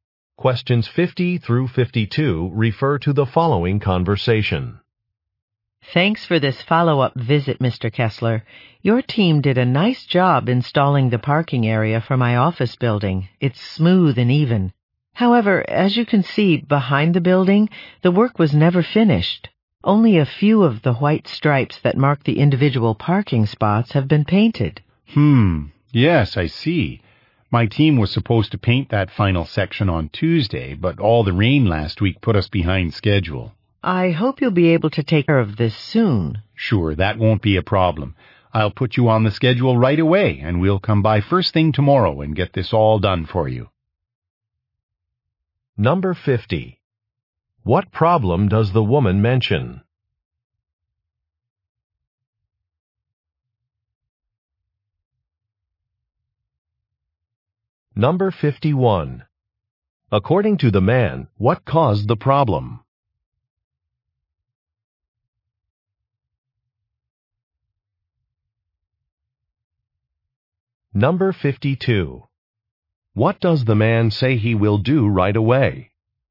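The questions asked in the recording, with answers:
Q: What problem does the woman mention?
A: Parking lines were not all painted

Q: According to the man, what caused the problem?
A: Rain / bad weather

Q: What does the man say he will do right away?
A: Put her on the schedule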